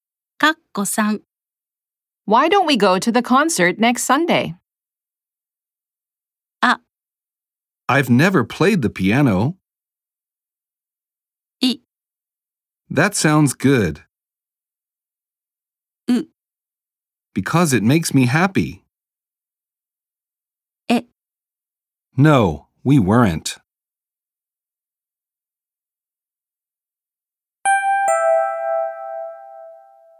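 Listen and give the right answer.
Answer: い: That sounds good.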